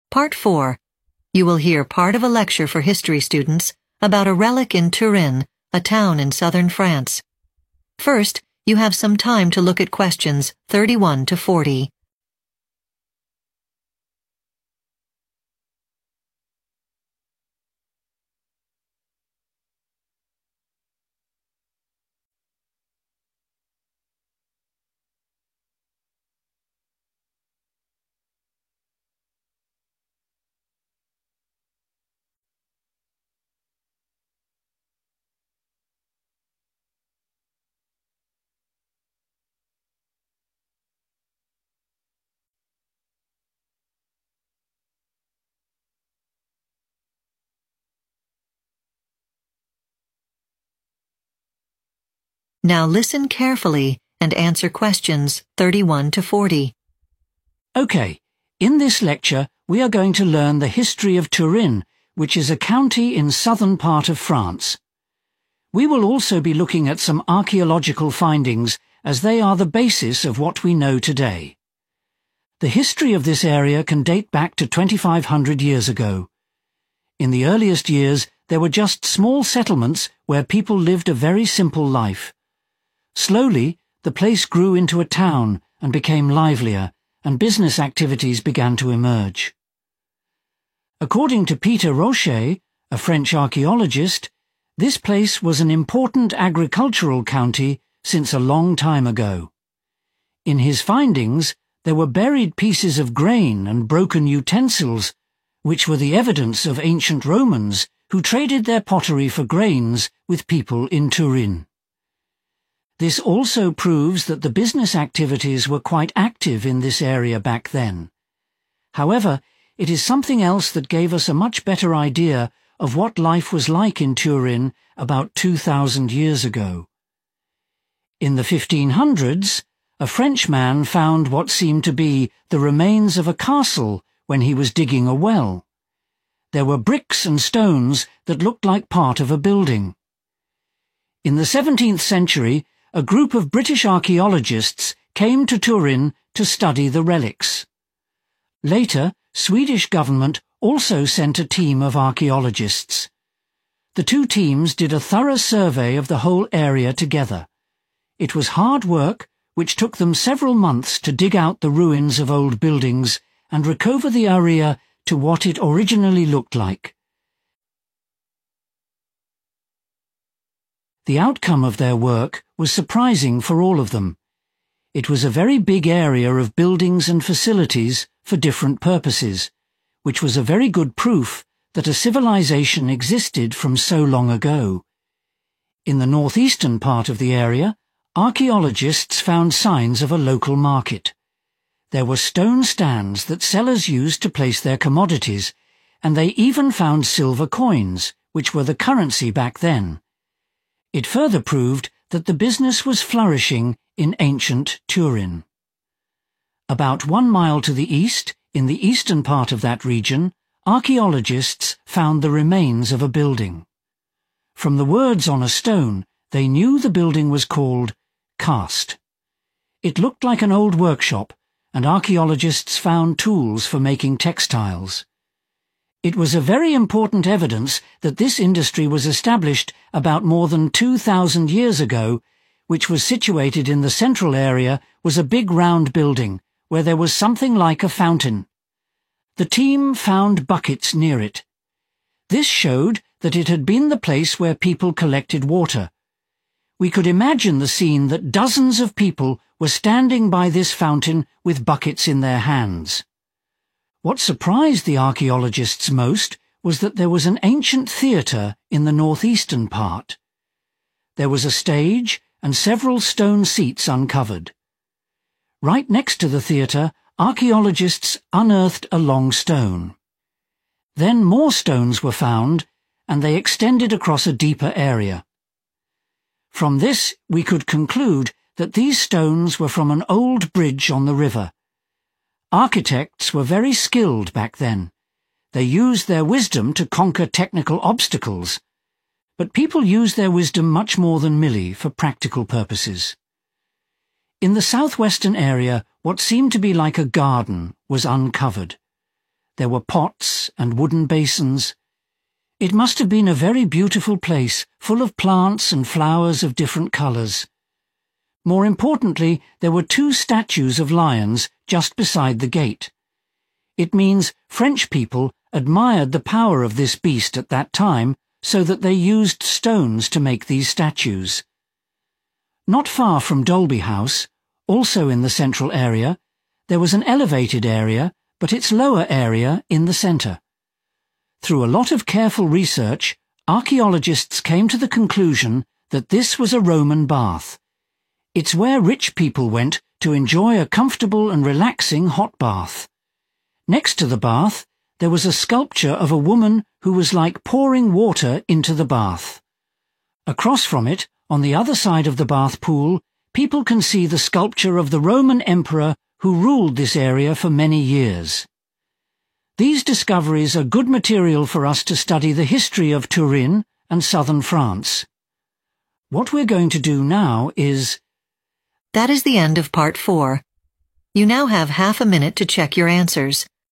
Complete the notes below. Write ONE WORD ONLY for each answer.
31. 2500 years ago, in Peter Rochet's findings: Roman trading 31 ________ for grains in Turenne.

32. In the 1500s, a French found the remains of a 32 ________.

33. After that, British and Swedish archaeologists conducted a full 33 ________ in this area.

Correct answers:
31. pottery
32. castle
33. survey